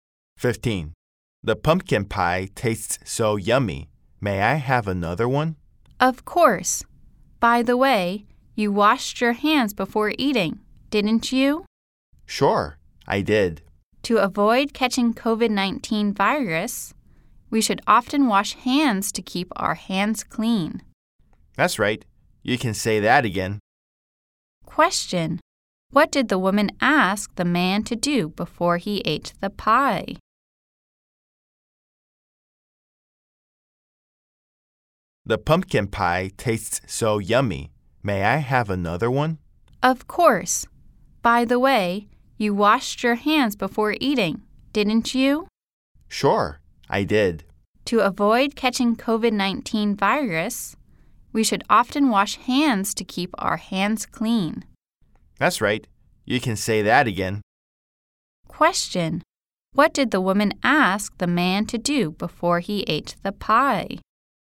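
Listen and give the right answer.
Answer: Wash his hands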